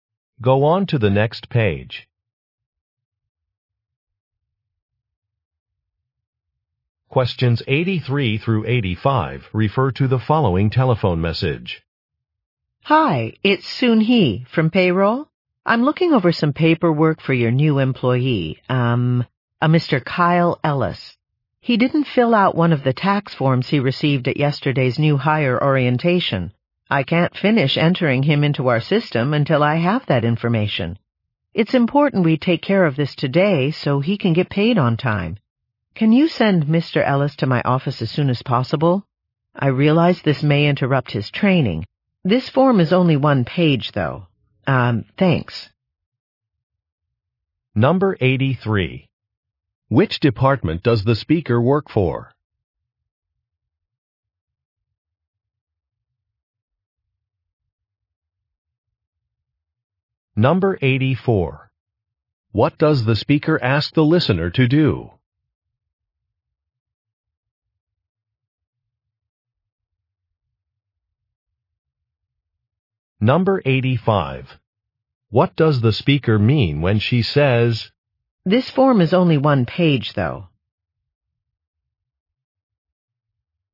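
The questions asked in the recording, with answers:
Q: Which department does the speaker work for?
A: Payroll

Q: What does the speaker ask the listener to do?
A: Send Mr. Ellis to her office

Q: What does the speaker mean when she says, "This form is only one page, though"?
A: The task will not take long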